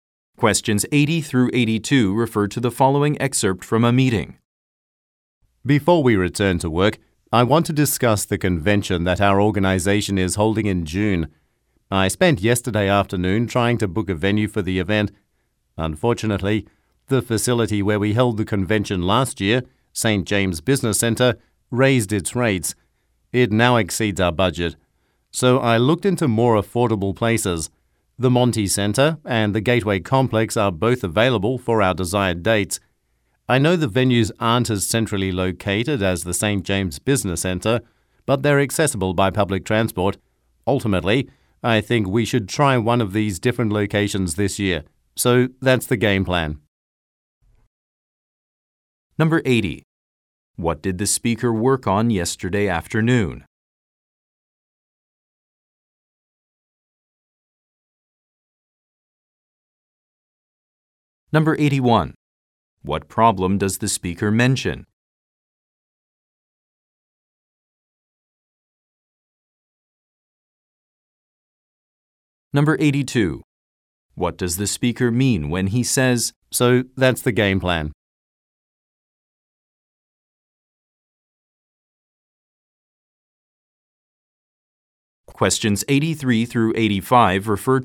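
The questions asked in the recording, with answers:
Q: What did the speaker work on yesterday afternoon?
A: Trying to book a venue for the convention

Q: What problem does the speaker mention?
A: Last year's venue raised its rates beyond the budget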